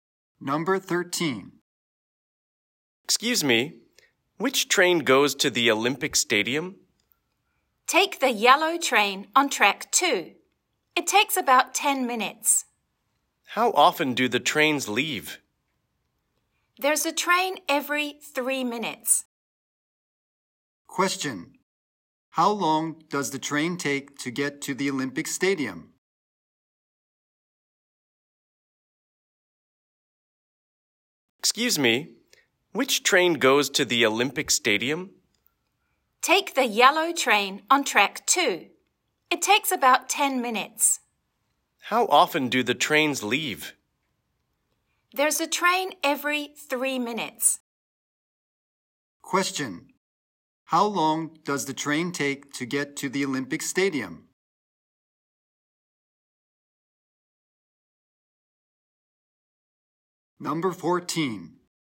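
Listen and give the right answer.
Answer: About 10 minutes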